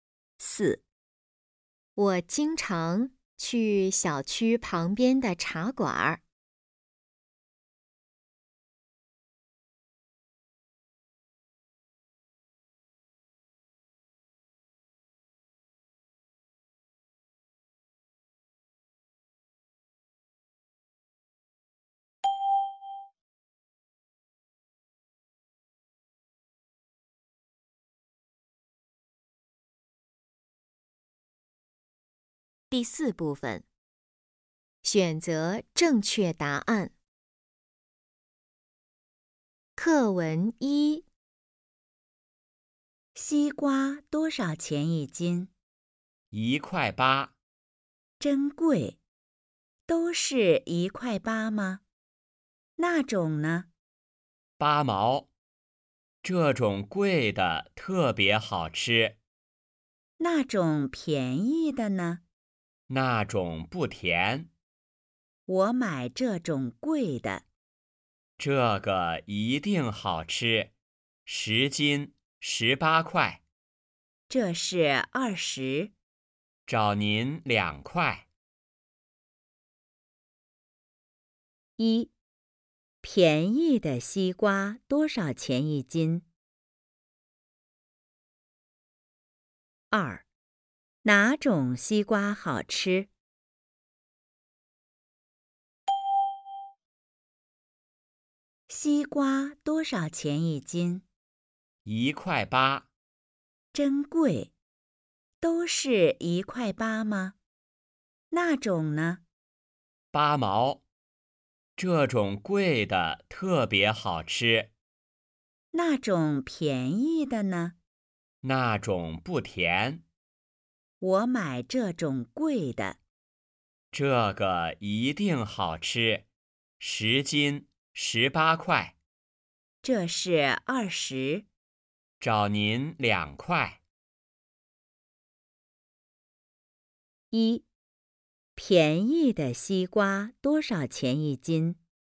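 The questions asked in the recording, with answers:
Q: 便宜的西瓜多少钱一斤?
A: 8毛

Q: 哪种西瓜好吃?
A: 贵的那种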